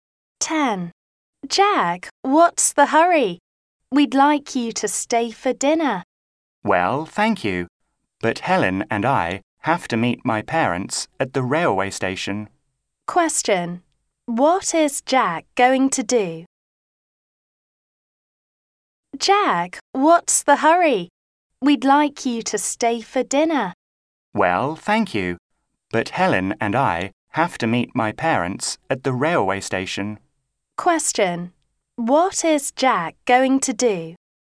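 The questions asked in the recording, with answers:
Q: What is Jack going to do?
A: Meet his parents at the railway station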